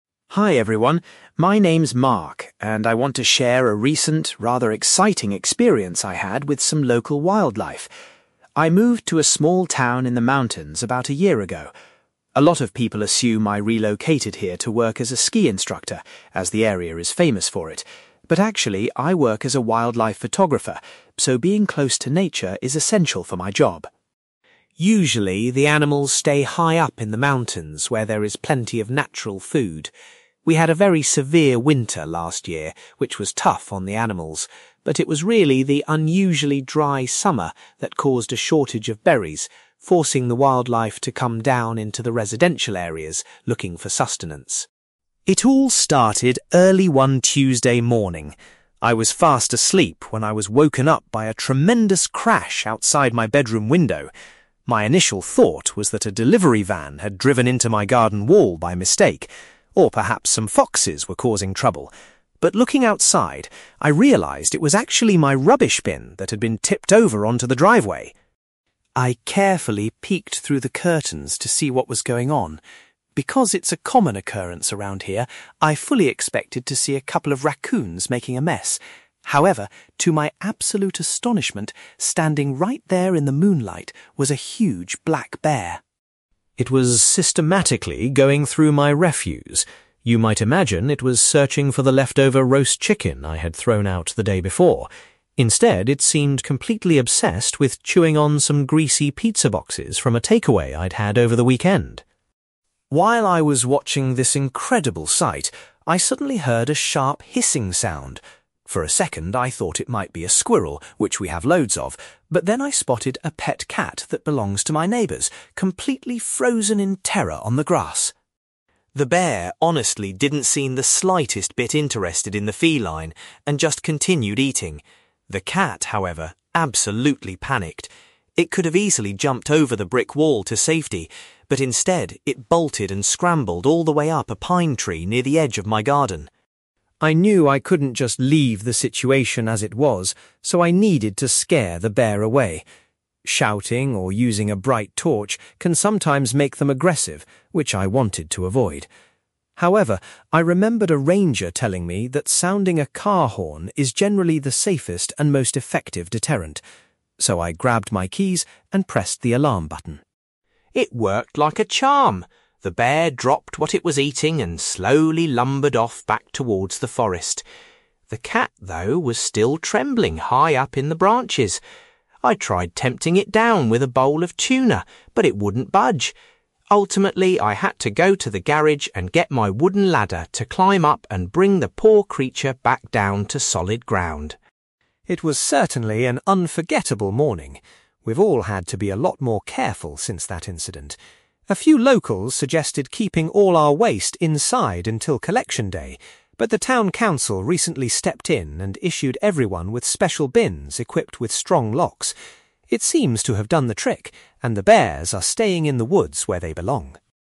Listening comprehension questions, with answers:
You will hear a young man called Mark giving a presentation about a recent wildlife encounter in his town. For questions 9-18, complete the sentences with a word or short phrase.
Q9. Mark's reason for moving to the mountains was because he works as a (9)........................... .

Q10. According to Mark, a (10)........................... was the main reason animals were coming into town for food.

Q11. Mark initially thought a vehicle had crashed, but the noise was actually made by a (11)........................... .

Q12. When Mark looked out of his window, he was surprised to see a (12)........................... in his garden.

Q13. Mark noticed that the animal was ignoring other food and eating some (13)........................... instead.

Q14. The hissing noise Mark heard was made by a terrified (14)........................... .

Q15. In its panic to escape, the feline climbed a (15)........................... .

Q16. Mark decided to use a (16)........................... to frighten the animal away safely.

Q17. Mark was forced to use a (17)........................... to rescue the trapped animal.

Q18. To prevent future incidents, the town council provided residents with bins that feature (18)........................... .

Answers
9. wildlife photographer
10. dry summer
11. rubbish bin
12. black bear
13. pizza boxes
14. pet cat
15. pine tree
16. car horn
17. wooden ladder
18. strong locks

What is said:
Mark: Hi everyone, my name is Mark and I want to share a recent, rather exciting experience I had with some local wildlife. I moved to a small town in the mountains about a year ago. A lot of people assume I relocated here to work as a ski instructor, as the area is famous for it, but actually, I work as a wildlife photographer, so being close to nature is essential for my job.
Usually, the animals stay high up in the mountains where there is plenty of natural food. We had a very severe winter last year, which was tough on the animals, but it was really the unusually dry summer that caused a shortage of berries, forcing the wildlife to come down into the residential areas looking for sustenance.
It all started early one Tuesday morning. I was fast asleep when I was woken up by a tremendous crash outside my bedroom window. My initial thought was that a delivery van had driven into my garden wall by mistake, or perhaps some foxes were causing trouble, but looking outside, I realised it was actually my rubbish bin that had been tipped over onto the driveway.
I carefully peeked through the curtains to see what was going on. Because it's a common occurrence around here, I fully expected to see a couple of raccoons making a mess. However, to my absolute astonishment, standing right there in the moonlight was a huge black bear.
It was systematically going through my refuse. You might imagine it was searching for the leftover roast chicken I had thrown out the day before. Instead, it seemed completely obsessed with chewing on some greasy pizza boxes from a takeaway I'd had over the weekend!
While I was watching this incredible sight, I suddenly heard a sharp hissing sound. For a second, I thought it might be a squirrel, which we have loads of, but then I spotted a pet cat that belongs to my neighbours, completely frozen in terror on the grass.
The bear honestly didn't seem the slightest bit interested in the feline and just continued eating. The cat, however, absolutely panicked. It could have easily jumped over the brick wall to safety, but instead, it bolted and scrambled all the way up a pine tree near the edge of my garden.
I knew I couldn't just leave the situation as it was, so I needed to scare the bear away. Shouting or using a bright torch can sometimes make them aggressive, which I wanted to avoid. However, I remembered a ranger telling me that sounding a car horn is generally the safest and most effective deterrent. So, I grabbed my keys and pressed the alarm button.
It worked like a charm! The bear dropped what it was eating and slowly lumbered off back towards the forest. The cat, though, was still trembling high up in the branches. I tried tempting it down with a bowl of tuna, but it wouldn't budge. Ultimately, I had to go to the garage and get my wooden ladder to climb up and bring the poor creature back down to solid ground.
It was certainly an unforgettable morning! We've all had to be a lot more careful since that incident. A few locals suggested keeping all our waste inside until collection day, but the town council recently stepped in and issued everyone with special bins equipped with strong locks. It seems to have done the trick, and the bears are staying in the woods where they belong.

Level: B2